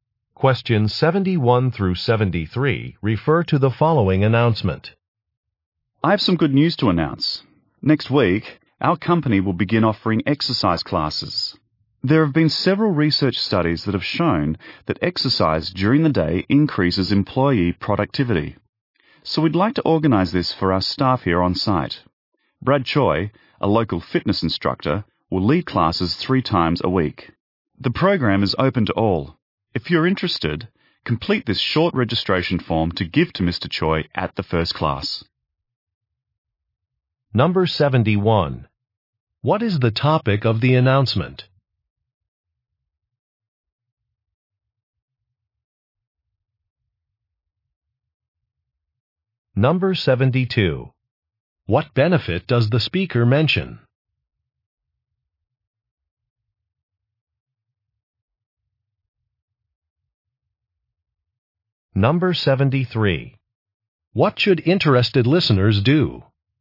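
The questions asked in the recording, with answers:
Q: What is the topic of the announcement?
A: New exercise classes for staff

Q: What benefit does the speaker mention?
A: Increased employee productivity

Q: What should interested listeners do?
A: Complete a registration form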